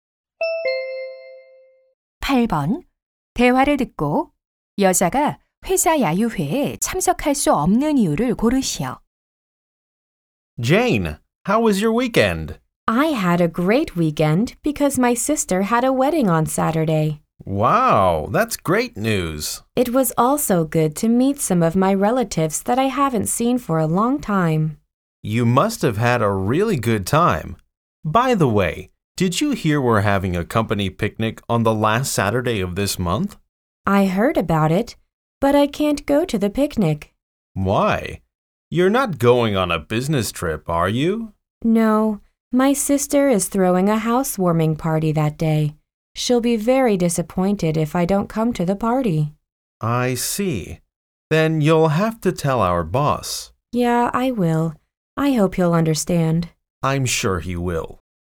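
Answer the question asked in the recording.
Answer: 언니의 집들이 파티에 가야 해서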